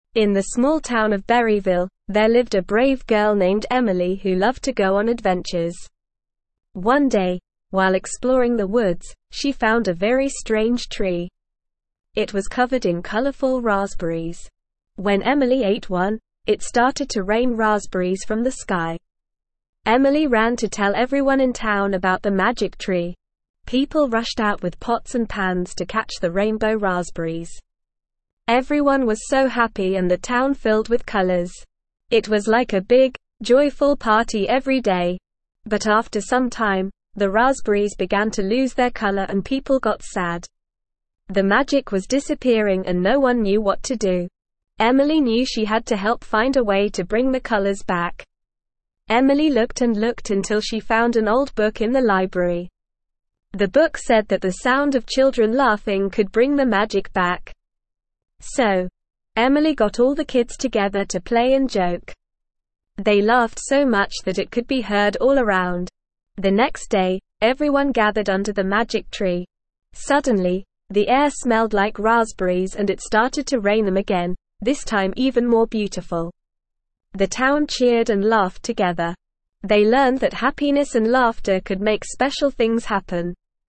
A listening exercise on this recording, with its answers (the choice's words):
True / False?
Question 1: When Emily ate one of the raspberries, it started to rain raspberries from the sky.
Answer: True

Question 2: The town of Berryville became filled with colors and everyone was happy.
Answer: True

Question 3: The next day, the town scattered away from the magic tree and it started to rain even more ugly raspberries, dispelling the magic.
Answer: False

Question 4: Eventually, the raspberries started to lose their color and people became sad.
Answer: True

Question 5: Emily found a tree in the woods that was covered in bland raspberries.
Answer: False

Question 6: Emily gathered all the kids together to play and joke, and they laughed so much that it could be heard all around.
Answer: True

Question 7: Emily is a scared girl who hates going on adventures.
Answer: False

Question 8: Emily discovered an old book in the library that said children laughing could not bring the magic back.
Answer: False

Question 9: In the small town of Berryville, there lived a brave girl named (1)______ who loved to go on adventures.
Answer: Emily

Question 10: One day, while exploring the woods, she (2)______ a very strange tree.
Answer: found

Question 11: It was covered in colorful (3)______!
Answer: raspberries

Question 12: Everyone was so happy and the (4)______ filled with colors.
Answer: town

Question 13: It was like a big, joyful (5)______ every day.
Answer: party

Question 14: But after some (6)______, the raspberries began to lose their color and people got sad.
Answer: time

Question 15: Emily looked and looked until she found an old book in the (7)______.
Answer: library

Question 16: The book said that the sound of children (8)______ could bring the magic back.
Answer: laughing

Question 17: So, Emily got all the kids together to play and (9)______.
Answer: joke

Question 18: They laughed so much that it could be (10)______ all around.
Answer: heard

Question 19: Suddenly, the air (11)______ like raspberries and it started to rain them again, this time even more beautiful.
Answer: smelled

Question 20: They learned that happiness and laughter could make (12)______ things happen.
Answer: special

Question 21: What did Emily find in the woods that was covered in colorful raspberries?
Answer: Emily found a strange tree covered in colorful raspberries.

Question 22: Why did people in the town rush out with pots and pans?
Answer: People in the town rushed out with pots and pans to catch the rainbow raspberries.

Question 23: Why did the raspberries start losing their color?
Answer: The raspberries started losing their color because the magic was disappearing.

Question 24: Where did Emily find the information about how to bring the colors back?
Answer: Emily found the information about how to bring the colors back in an old book in the library.

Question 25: What did Emily and the other kids do to bring the magic back?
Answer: Emily and the other kids laughed and played together to bring the magic back.

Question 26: What did Emily find in the woods?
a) A strange tree covered in colorful raspberries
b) A hidden treasure chest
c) A secret cave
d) A talking animal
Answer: A strange tree covered in colorful raspberries

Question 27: How did the people in town react when they heard about the magic tree?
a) They ignored Emily and went about their day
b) They were scared of the magic tree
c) They didn't believe Emily and thought she was making it up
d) They rushed out with pots and pans to catch the rainbow raspberries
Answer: They rushed out with pots and pans to catch the rainbow raspberries

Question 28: What happened to the raspberries after some time?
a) They turned into apples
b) They began to lose their color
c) They started growing on other trees in town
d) They multiplied and covered the entire town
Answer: They began to lose their color

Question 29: How did Emily discover a way to bring the colors back?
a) She asked a wise old man for advice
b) She had a dream about it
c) She stumbled upon a magical potion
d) She found an old book in the library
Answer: She found an old book in the library

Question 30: What did the book in the library say could bring the magic back?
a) The sound of bells ringing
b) The sound of children laughing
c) The smell of flowers blooming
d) The taste of chocolate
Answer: The sound of children laughing

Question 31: What did Emily do to bring the magic back?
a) She sang a special song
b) She danced under the magic tree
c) She got all the kids together to play and joke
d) She planted more raspberry trees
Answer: She got all the kids together to play and joke

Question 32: What happened the next day when everyone gathered under the magic tree?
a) The tree disappeared forever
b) The raspberries turned into apples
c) The air smelled like raspberries and it started to rain them again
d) The town became sad again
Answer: The air smelled like raspberries and it started to rain them again

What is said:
In the small town of Berryville, there lived a brave girl named Emily who loved to go on adventures. One day, while exploring the woods, she found a very strange tree. It was covered in colorful raspberries! When Emily ate one, it started to rain raspberries from the sky!
Emily ran to tell everyone in town about the magic tree. People rushed out with pots and pans to catch the rainbow raspberries. Everyone was so happy and the town filled with colors. It was like a big, joyful party every day.
But after some time, the raspberries began to lose their color and people got sad. The magic was disappearing and no one knew what to do. Emily knew she had to help find a way to bring the colors back.
Emily looked and looked until she found an old book in the library. The book said that the sound of children laughing could bring the magic back. So, Emily got all the kids together to play and joke. They laughed so much that it could be heard all around.
The next day, everyone gathered under the magic tree. Suddenly, the air smelled like raspberries and it started to rain them again, this time even more beautiful. The town cheered and laughed together. They learned that happiness and laughter could make special things happen.

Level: Level 2